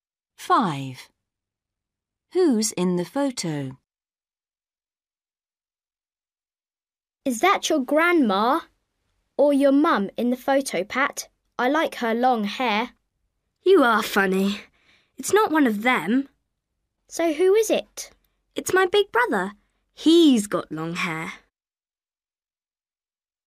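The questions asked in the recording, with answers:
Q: Who's in the photo?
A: Pat's big brother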